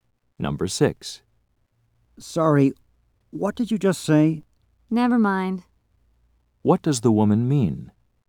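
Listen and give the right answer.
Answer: What she said was not important.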